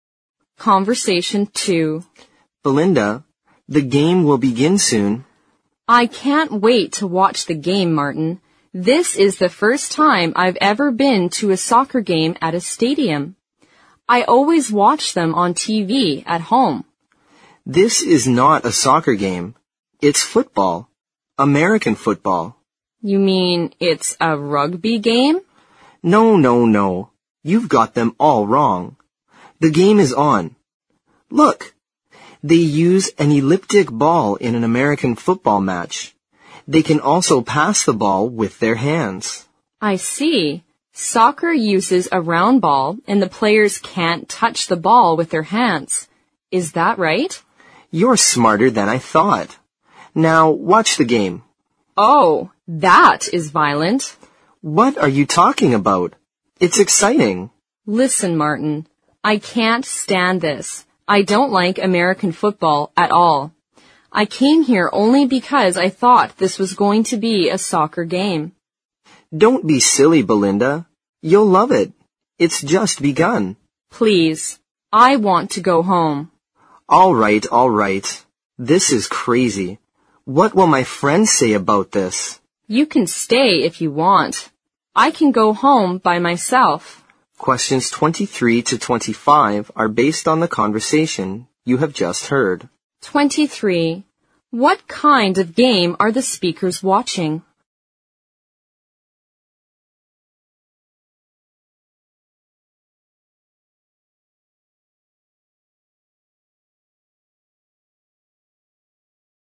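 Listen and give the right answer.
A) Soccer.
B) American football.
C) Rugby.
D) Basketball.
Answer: B) American football.

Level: 四级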